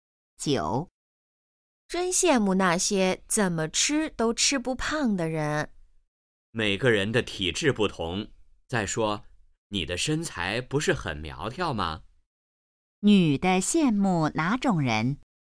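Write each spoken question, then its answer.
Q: 女的羡慕哪种人?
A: 怎么吃都吃不胖的人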